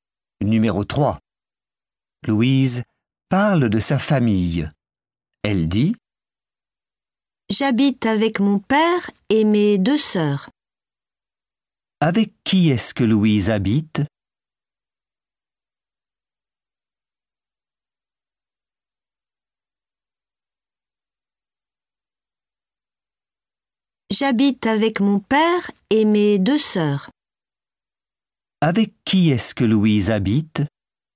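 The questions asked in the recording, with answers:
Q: Avec qui est-ce que Louise habite?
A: avec son père et ses deux sœurs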